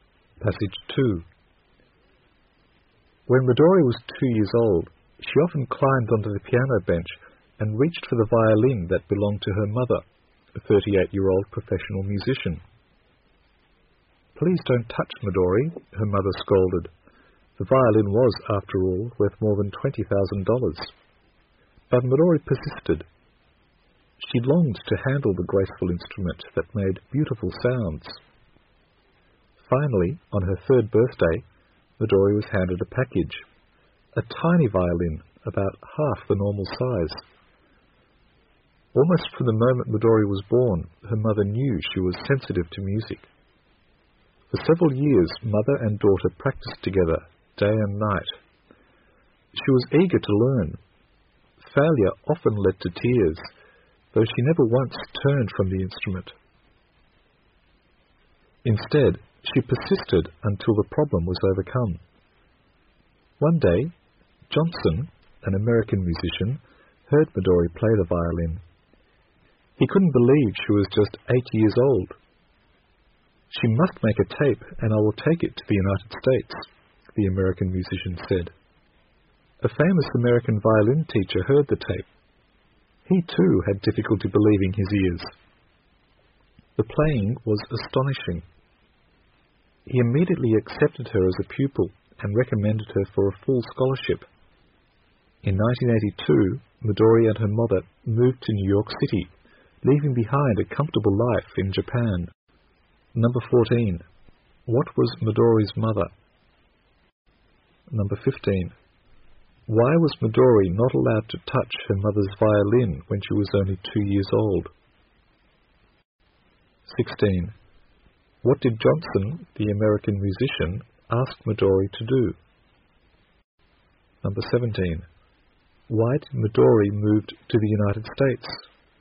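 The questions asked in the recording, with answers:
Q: What was Midori's mother?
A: A professional musician

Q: Why was Midori not allowed to touch her mother's violin when she was only 2 years old?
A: It was very valuable (worth over $20,000)

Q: What did Johnson, the American musician, ask Midori to do?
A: Make a tape

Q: Why did Midori move to the United States?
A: To study with a famous American violin teacher on a scholarship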